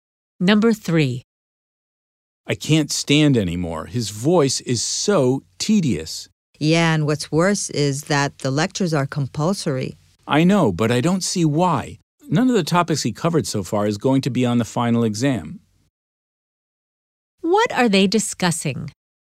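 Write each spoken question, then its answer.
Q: What are they discussing?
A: A boring compulsory lecture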